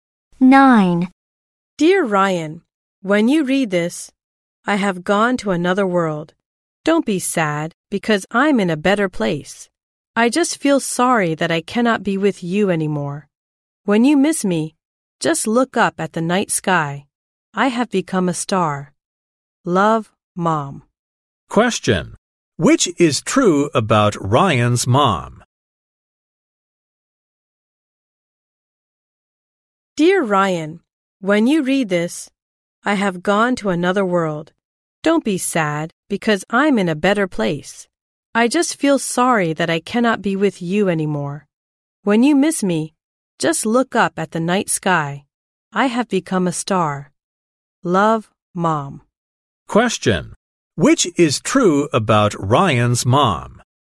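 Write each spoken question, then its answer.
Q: Which is true about Ryan's mom?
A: She has died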